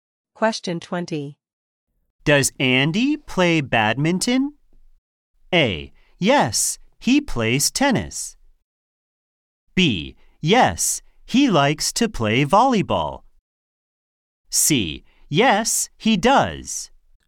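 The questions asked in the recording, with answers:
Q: Does Andy play badminton?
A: C: Yes, he does.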